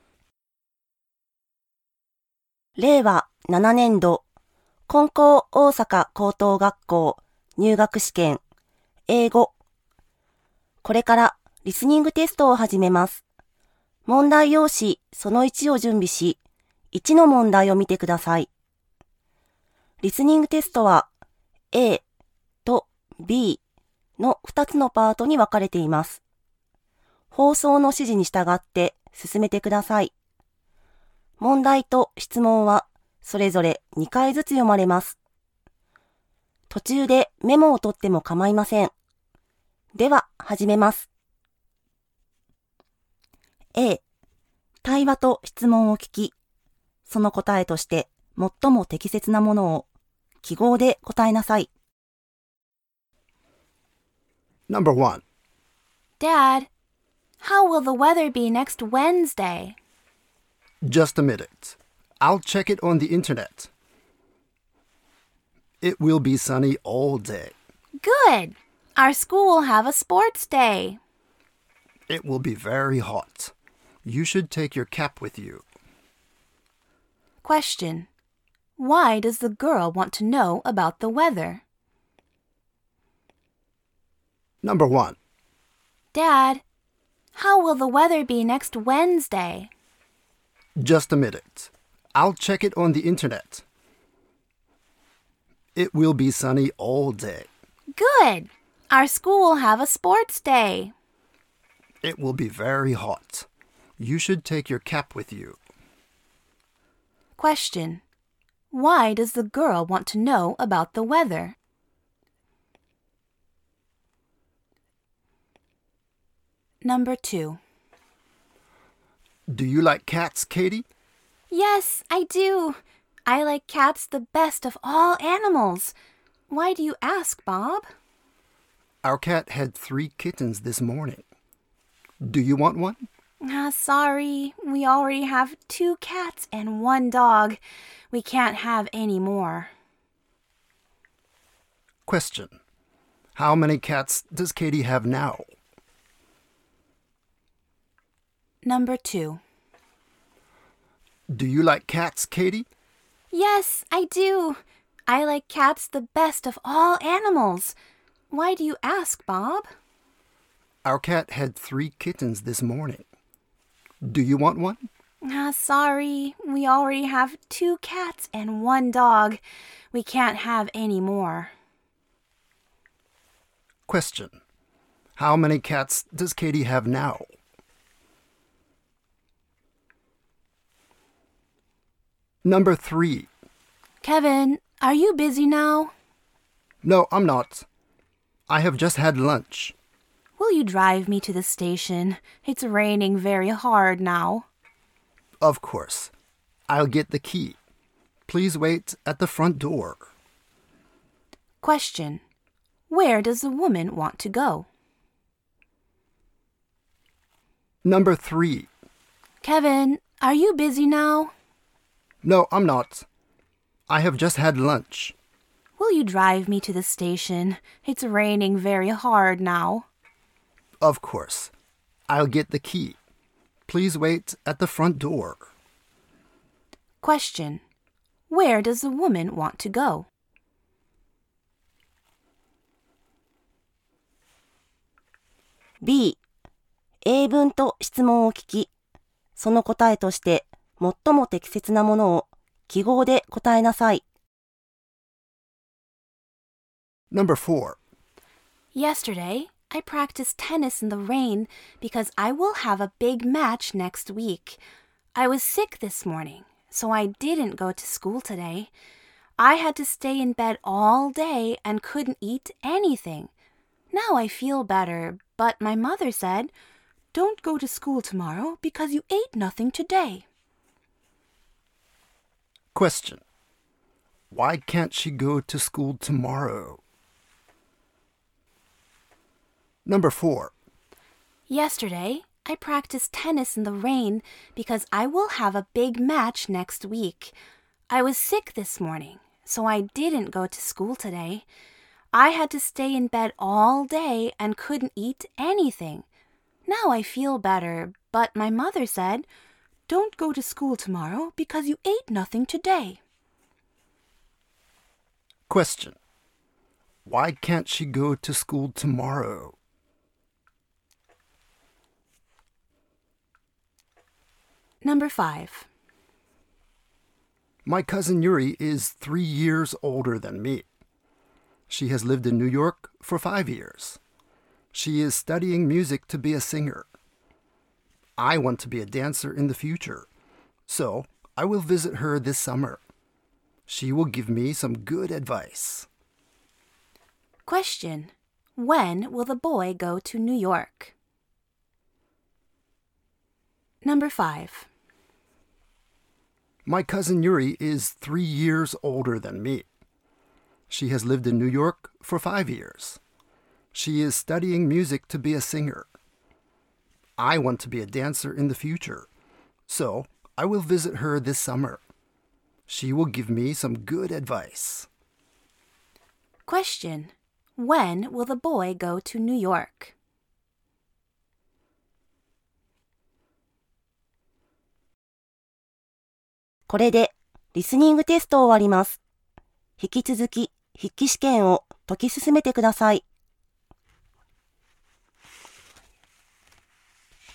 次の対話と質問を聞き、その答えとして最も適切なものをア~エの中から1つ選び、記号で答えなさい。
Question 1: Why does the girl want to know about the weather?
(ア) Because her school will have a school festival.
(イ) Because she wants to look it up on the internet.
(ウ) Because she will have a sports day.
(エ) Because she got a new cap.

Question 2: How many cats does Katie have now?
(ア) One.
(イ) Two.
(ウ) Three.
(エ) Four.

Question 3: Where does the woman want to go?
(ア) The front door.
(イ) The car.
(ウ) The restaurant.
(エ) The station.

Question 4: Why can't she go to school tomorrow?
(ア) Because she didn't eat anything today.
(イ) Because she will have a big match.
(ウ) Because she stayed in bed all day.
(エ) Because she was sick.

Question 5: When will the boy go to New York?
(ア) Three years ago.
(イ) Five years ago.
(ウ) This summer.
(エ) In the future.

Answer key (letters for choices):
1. ウ
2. イ
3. エ
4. ア
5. ウ

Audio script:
ただいまより、リスニングテストを始めます。
放送の指示に従って進めて下さい。問題と質問はそれぞれ2度ずつ読まれます。
途中でメモをとってもかまいません。では始めます。
[A]次の対話と質問を聞き、その答えとして最も適切なものをア~エの中から1つ選び、記号で答えなさい。
• ア) Because her school will have a school festival.
• イ) Because she wants to look it up on the internet.
[B]次の英文と質問を聞き、その答えとして最も適切なものをア~エの中から1つ選び、記号で答えなさい。
• ア) Because she didn't eat anything today.
• A : Dad, how will the weather be next Wednesday?
• B : Just a minute. I'll check it on the internet. ・・・ It will be sunny all day.
• A : Good! Our school will have a sports day.
• B : It will be very hot. You should take your cap with you.
Question : Why does the girl want to know about the weather?
• A : Do you like cats, Katie?
• B : Yes, I do. I like cats the best of all animals. Why do you ask, Bob?
• A : Our cat had three kittens this morning. Do you want one?
• B : Sorry, we already have two cats and one dog. We can't have any more.
Question : How many cats does Katie have now?
• A : Kevin, are you busy now?
• B : No, I'm not. I have just had lunch.
• A : Will you drive me to the station? It's raining very hard now.
• B : Of course! I'll get the key. Please wait at the front door.
Question : Where does the woman want to go?
Yesterday I practiced tennis in the rain because I will have a big match next week. I was sick this morning, so I didn't go to school today. I had to stay in bed all day and couldn't eat anything. Now I feel better, but my mother said, "Don't go to school tomorrow, because you ate nothing today."
Question : Why can't she go to school tomorrow?
My cousin Yuri is three years older than me. She has lived in New York for five years. She is studying music to be a singer. I want to be a dancer in the future, so I will visit her this summer. She will give me some good advice.
Question : When will the boy go to New York?
令和6年度 英語リスニング問題

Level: 高校